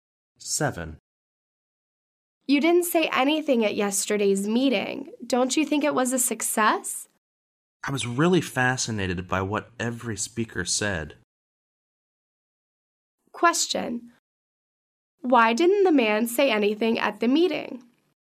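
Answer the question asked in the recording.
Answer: He was so fascinated by what the speakers said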